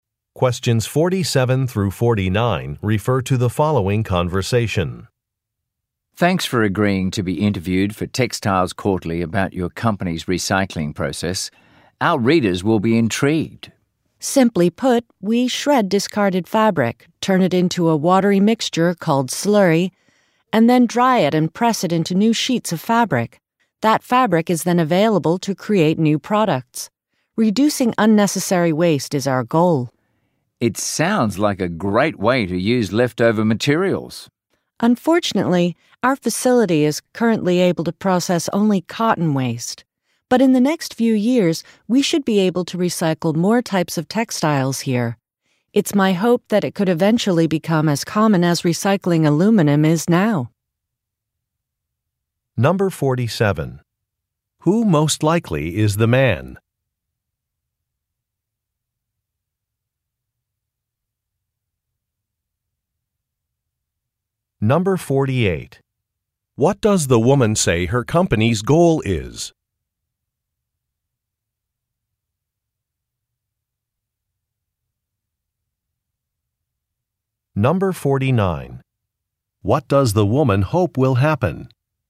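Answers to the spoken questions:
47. A journalist for Textiles Quarterly
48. Reducing unnecessary waste
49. Textile recycling will become as common as aluminum recycling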